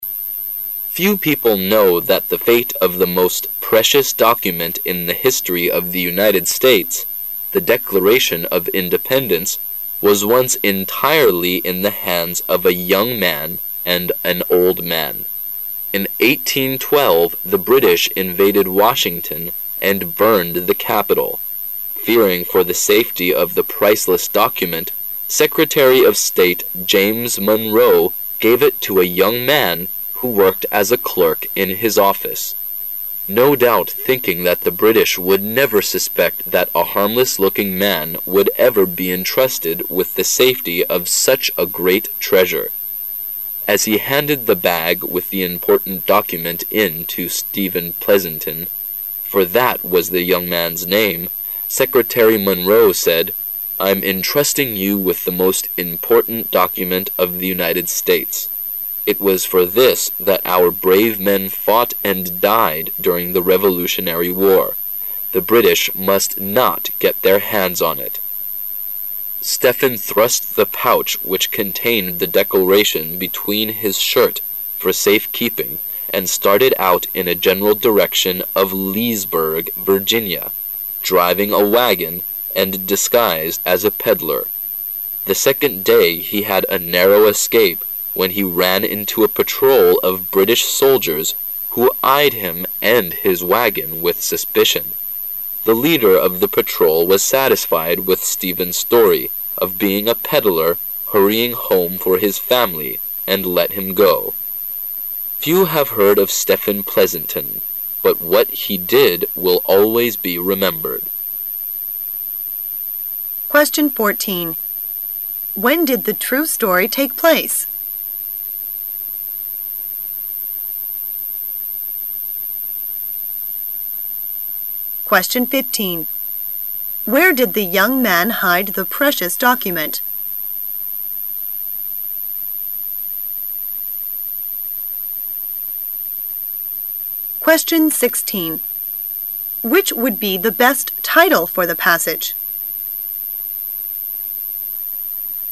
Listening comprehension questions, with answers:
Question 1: Where did the young man hide the precious document?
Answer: Beneath his shirt.

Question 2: Which would be the best title for the passage?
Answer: A Young Man Saved the Declaration of Independence

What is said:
[解析] 14-16 Few people know that the fate of the most precious document in the history of the United States the Declaration of Independence was once entirely in the hands of a young man and an old man. In 1812 the British invaded Washington and burned the capital. Fearing for the safety of the priceless document, Secretary of State James Manroe gave it to a young man who worked as a clerk in his office. No doubt thinking that the British would never suspect that a harmless-looking man would ever be entrusted with the safety of such a great treasure. As he handed the bag with the important document in to Stephen Pleasanton, for that was the young man's name, Secretary Manroe said, "I'm entrusting you with the most important document of the United States. It was for this that our brave men fought and died during the revolutionary war. The British must not get their hands on it." Stephen thrust the pouch which contained the Declaration beneath his shirt for safe keeping and started out in a general direction of Leesburg, Virginia, driving a wagon and disguised as a peddler. The second day he had a narrow escape when he ran into a patrol of British soldiers who eyed him and his wagon with suspicion. The leader of the patrol was satisfied with Stephen's story of being a peddler hurrying home for his family and let him go. Few have heard of Stephen Pleasanton, but what he did will always be remembered. 14.When did the true story take place?